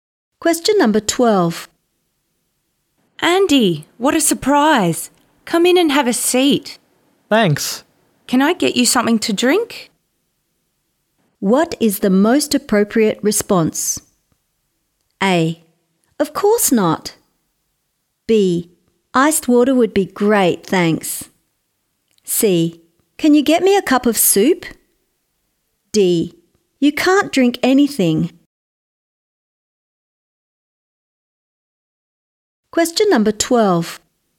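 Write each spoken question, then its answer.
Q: What is the most appropriate response?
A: B: Iced water would be great, thanks.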